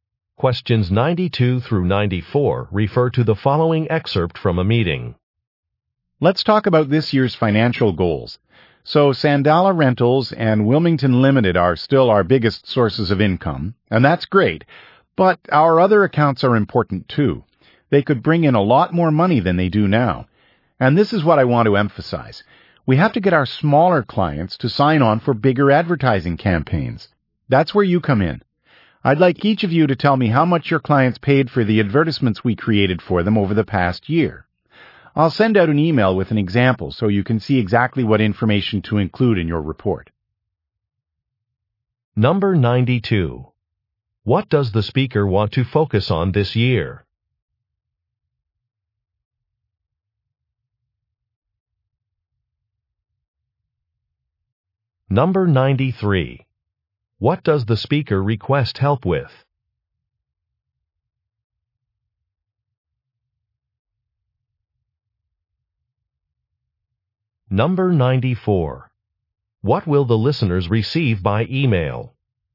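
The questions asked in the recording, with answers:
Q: What does the speaker want to focus on this year?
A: Getting smaller clients to sign on for bigger advertising campaigns

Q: What does the speaker request help with?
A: Reporting how much their clients paid for advertisements

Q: What will the listeners receive by email?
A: An example report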